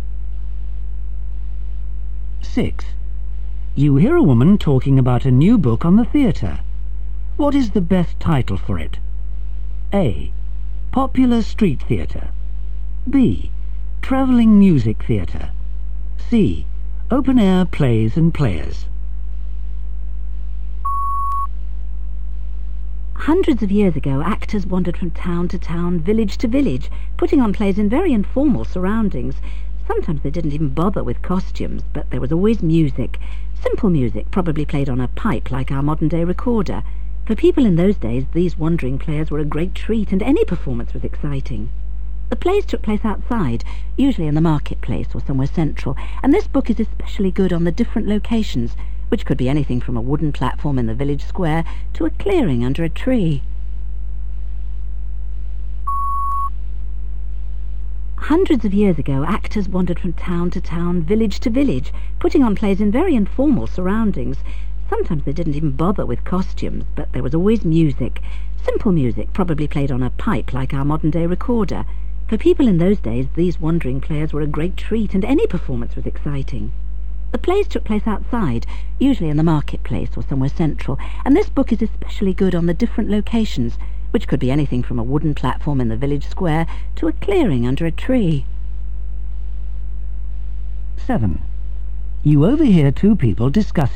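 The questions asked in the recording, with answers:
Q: What is the best title for it?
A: C: Open Air Plays and Players.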